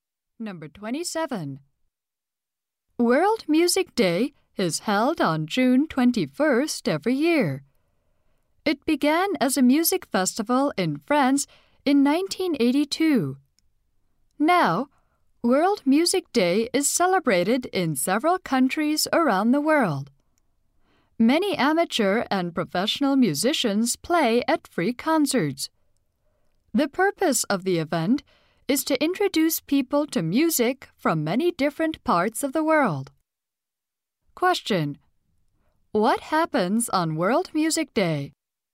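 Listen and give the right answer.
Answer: Musicians play at free concerts.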